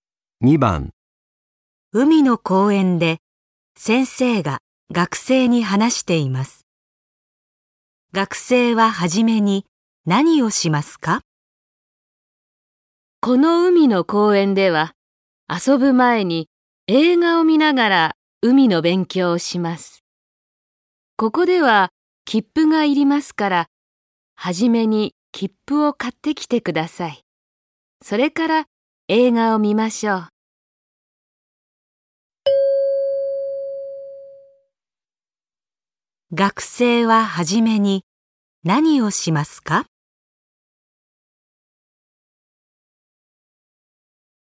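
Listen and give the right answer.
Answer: 切符を買う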